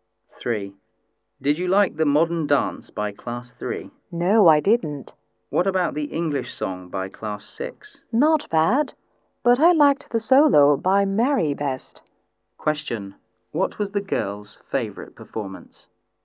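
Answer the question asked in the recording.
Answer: The solo by Mary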